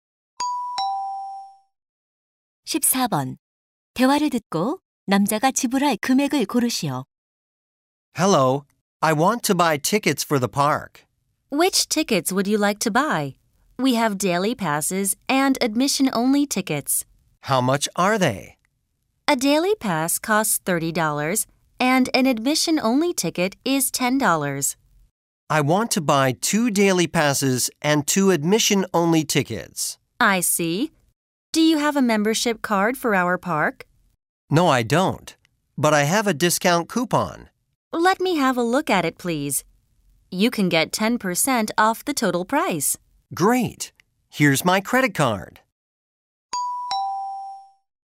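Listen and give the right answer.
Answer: $72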